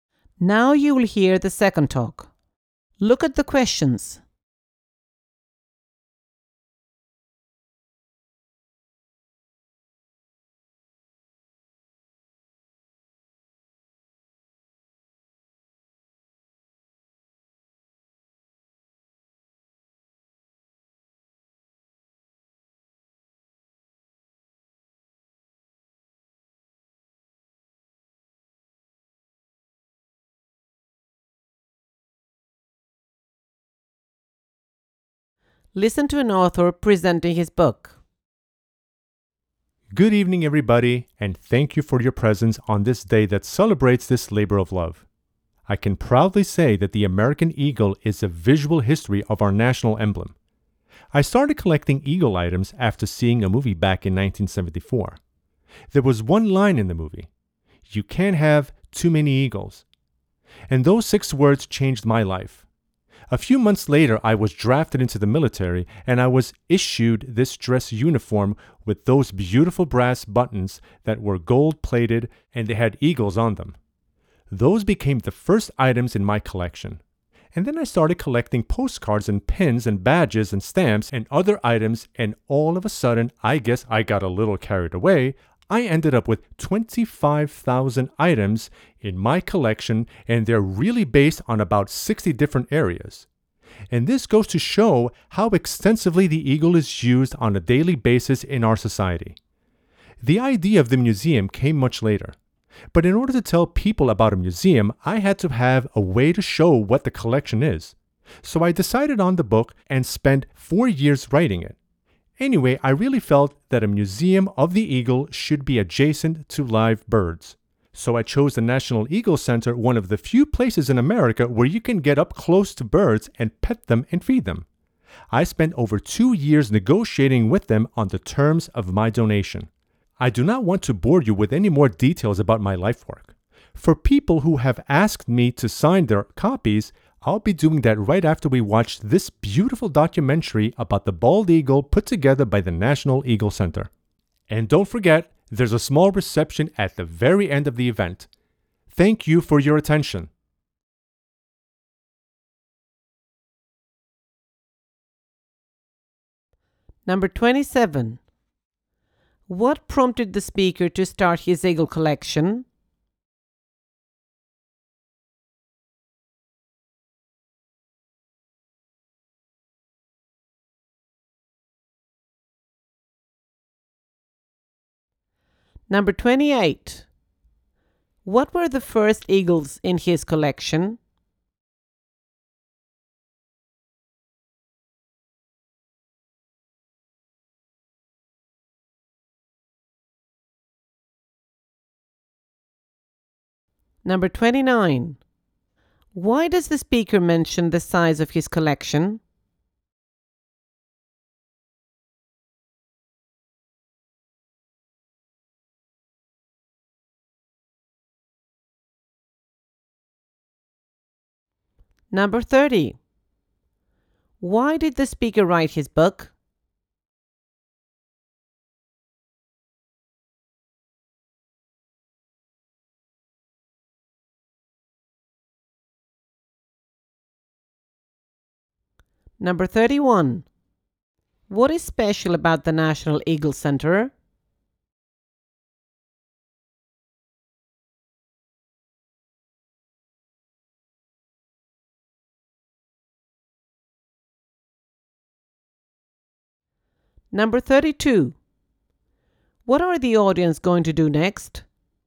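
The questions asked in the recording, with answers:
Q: What prompted the speaker to start his eagle collection?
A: A line in a movie: "You can't have too many eagles"

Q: What were the first eagles in his collection?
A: The eagles on the brass buttons of his military dress uniform

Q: Why does the speaker mention the size of his collection?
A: To show how widely the eagle is used in daily life

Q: Why did the speaker write his book?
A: To show people what the museum's collection is

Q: What is special about the National Eagle Center?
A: You can get up close to live birds, pet them and feed them

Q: What are the audience going to do next?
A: Watch a documentary about the bald eagle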